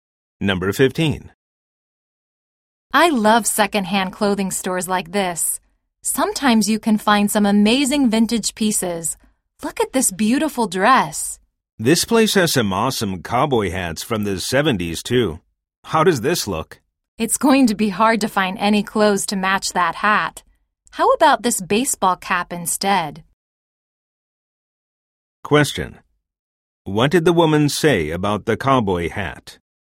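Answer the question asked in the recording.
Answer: It would be hard to find clothes to match it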